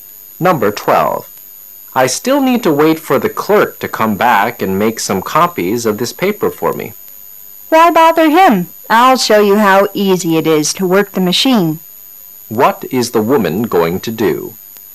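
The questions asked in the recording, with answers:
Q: What is the woman going to do?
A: Show the man how to use the copy machine.

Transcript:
I still need to wait for the clerk to come back and make some copies of this paper for me. W: Why bother him? I'll show you how easy it is to work the machine. Q: What is the woman going to do?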